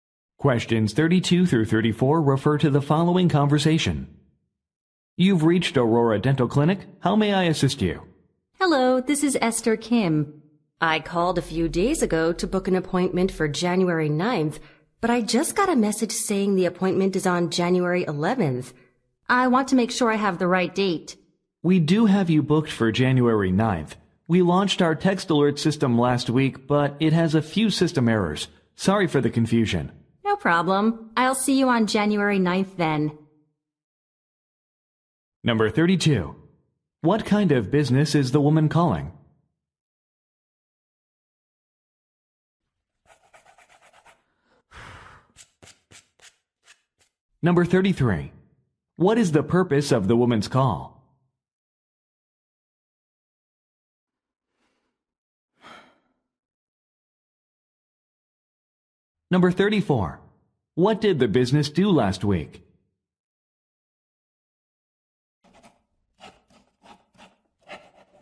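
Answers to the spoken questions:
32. A dental clinic
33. To confirm her appointment date
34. Launched a text alert system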